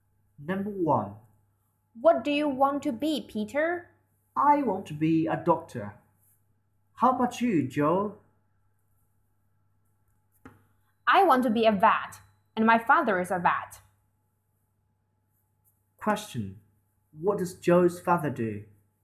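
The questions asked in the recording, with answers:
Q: What does Joe's father do?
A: He is a vet.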